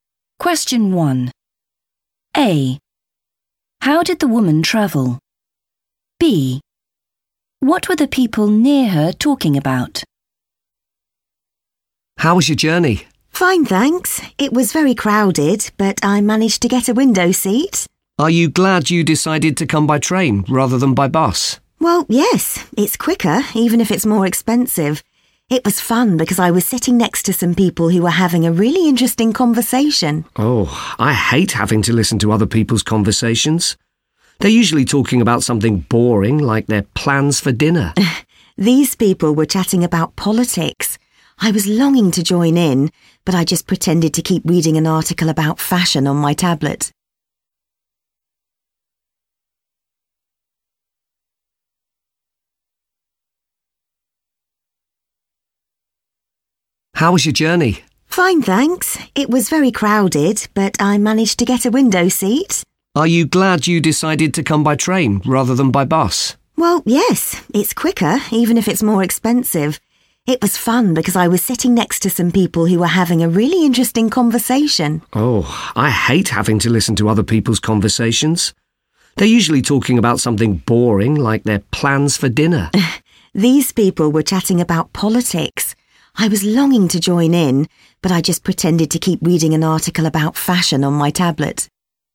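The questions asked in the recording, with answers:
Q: How did the woman travel?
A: by train

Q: What were the people near her talking about?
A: politics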